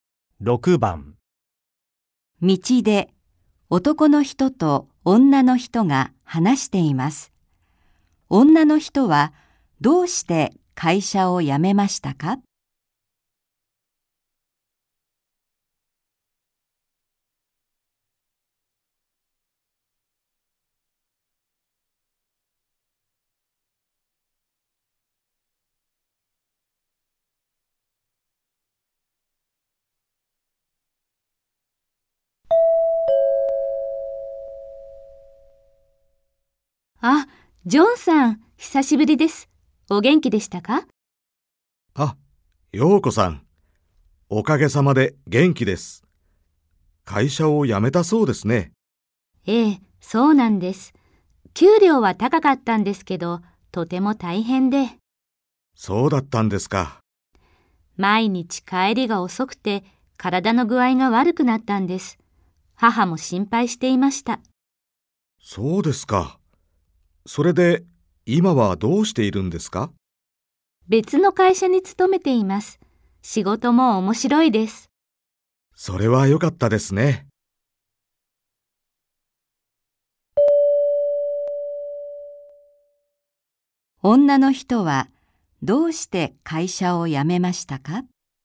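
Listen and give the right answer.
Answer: 毎日帰りが遅くて、体の具合が悪くなったから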